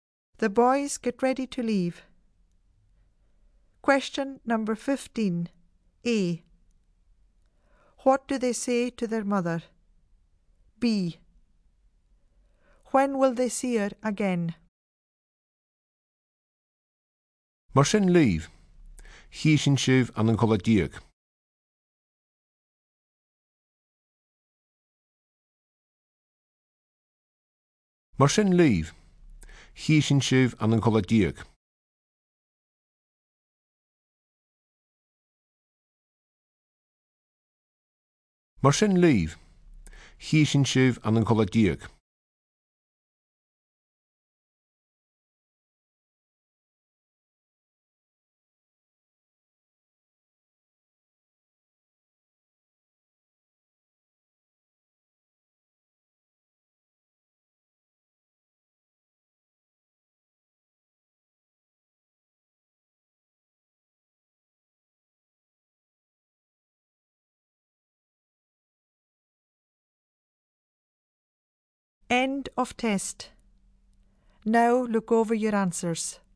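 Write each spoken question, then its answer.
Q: A. What do they say to their mother?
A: Goodbye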